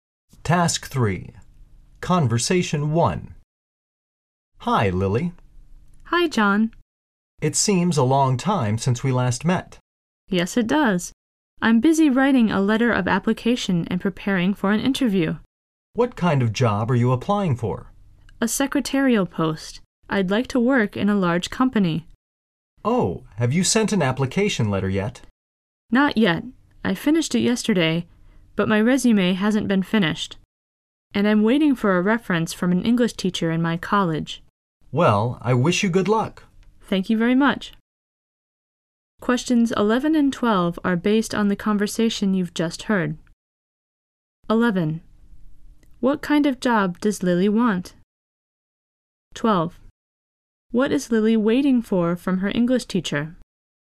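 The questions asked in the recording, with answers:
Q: What kind of job does Lily want?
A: A secretarial post in a large company

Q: What is Lily waiting for from her English teacher?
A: A reference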